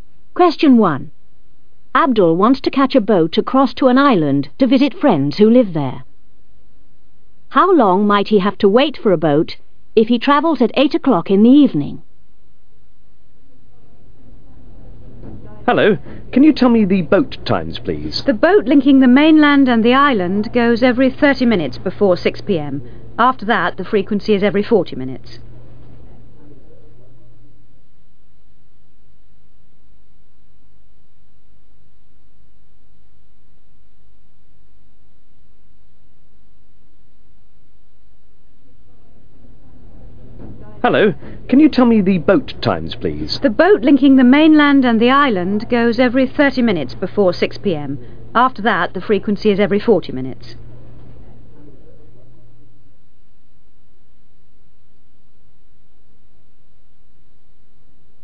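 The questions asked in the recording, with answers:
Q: How long might he have to wait for a boat if he travels at 8 o'clock in the evening?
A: 40 minutes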